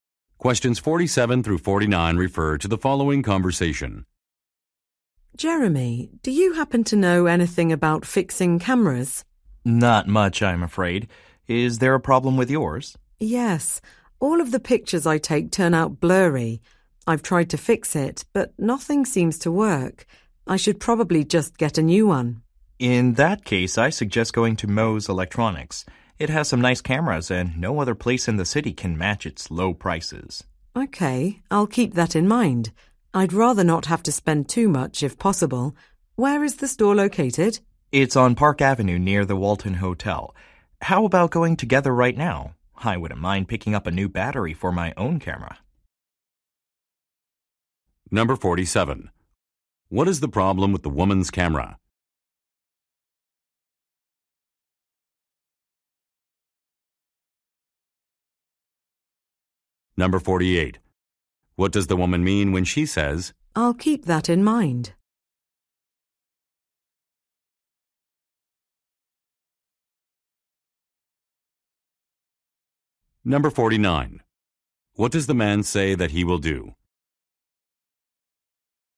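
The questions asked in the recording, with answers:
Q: What is the problem with the woman's camera?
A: Its pictures are blurry

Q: What does the woman mean when she says,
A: She will consider going to Moe's Electronics

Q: What does the man say that he will do?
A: Go to the store with her and buy a new battery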